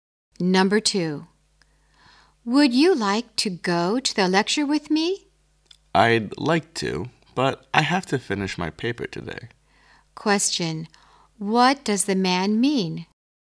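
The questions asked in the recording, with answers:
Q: What does the man mean?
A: He can't go to the lecture because he has to finish his paper today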